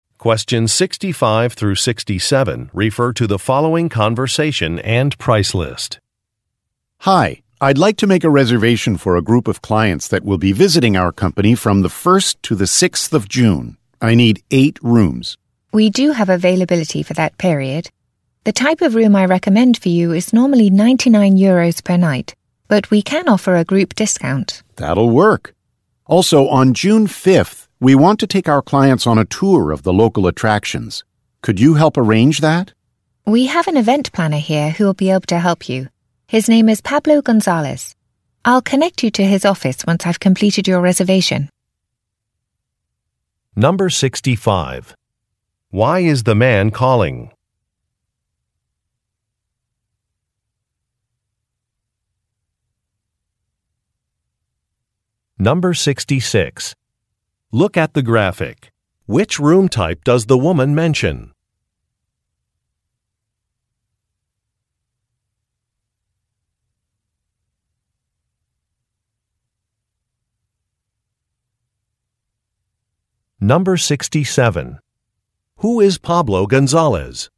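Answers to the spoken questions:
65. To make a hotel reservation for a group of clients
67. An event planner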